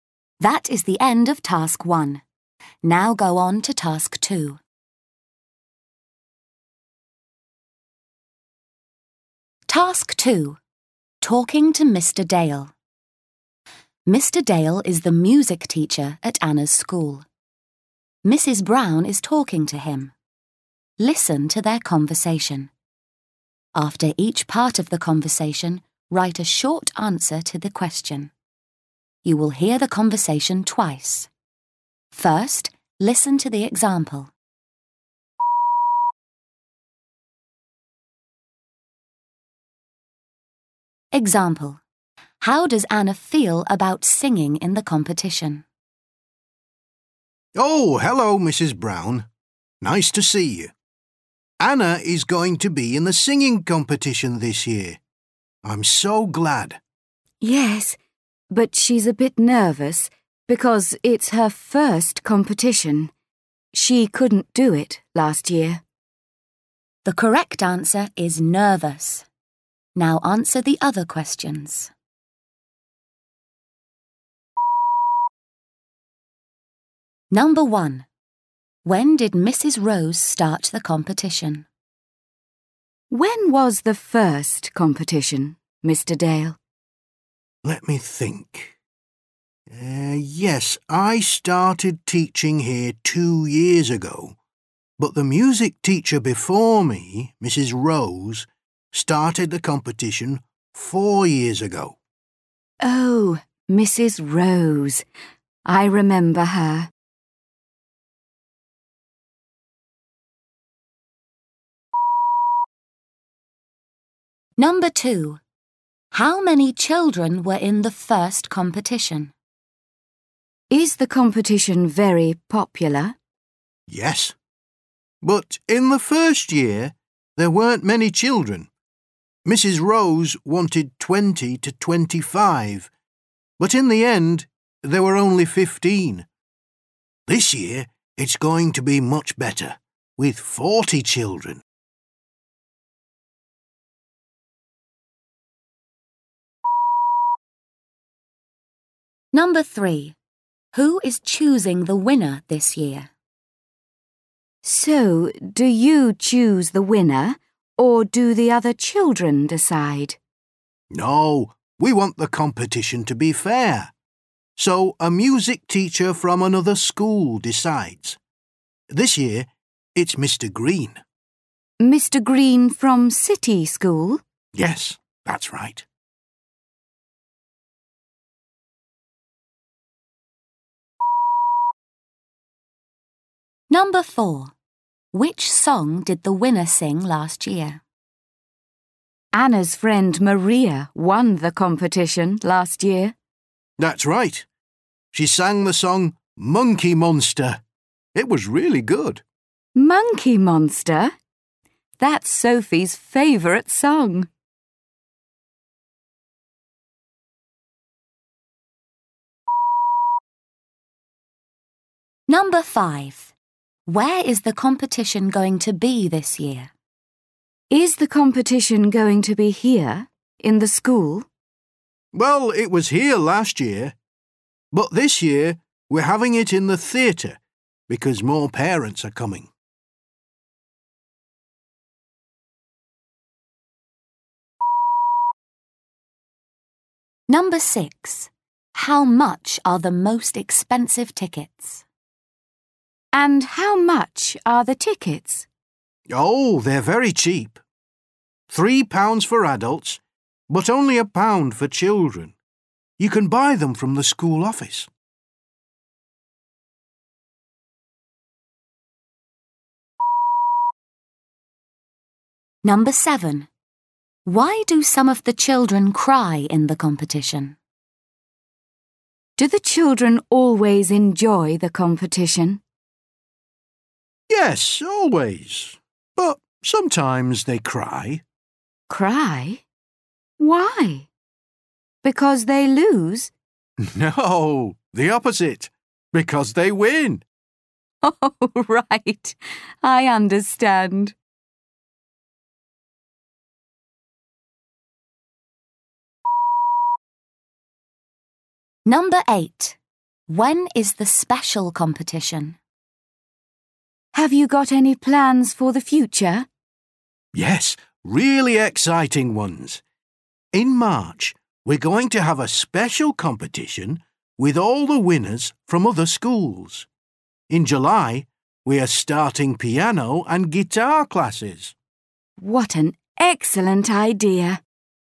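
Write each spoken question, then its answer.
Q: When did Mrs. Rose start the competition?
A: 4 years ago

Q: How many children were in the first competition?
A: 15

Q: Who is choosing the winner this year?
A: Mr. Green

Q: Which song did the winner sing last year?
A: Monkey Monster

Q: Where is the competition going to be this year?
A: In the theatre

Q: Why do some of the children cry in the competition?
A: Because they win

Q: When is the special competition?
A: In March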